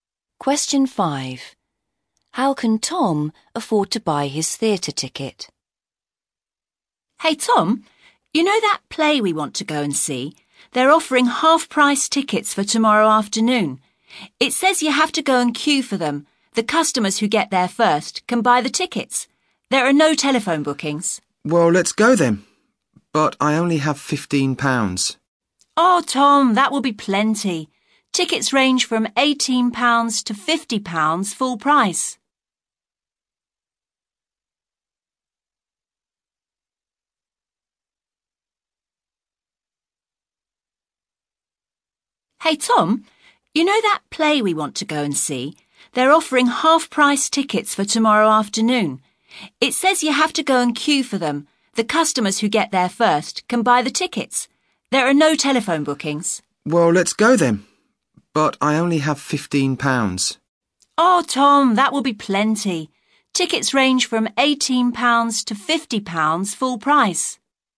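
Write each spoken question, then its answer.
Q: How can Tom afford to buy his theatre ticket?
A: Tickets are half price for tomorrow afternoon (£9 to £25)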